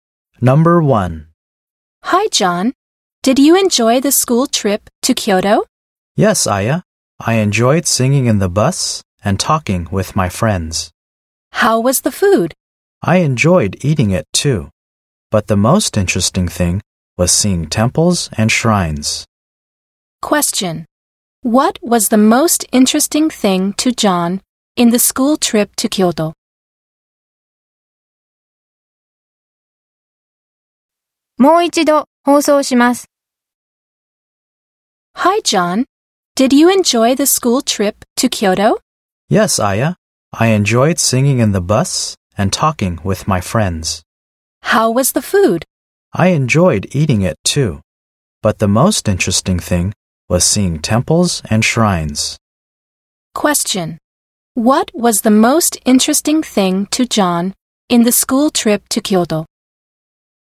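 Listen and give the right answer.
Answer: Seeing temples and shrines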